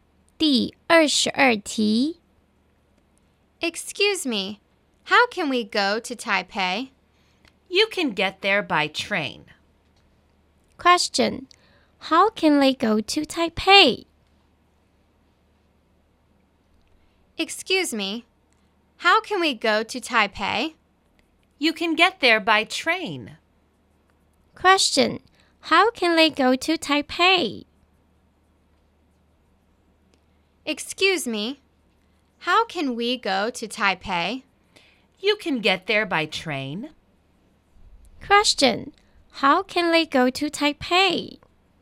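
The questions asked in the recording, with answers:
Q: Question, how can they go to Taipei?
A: By train.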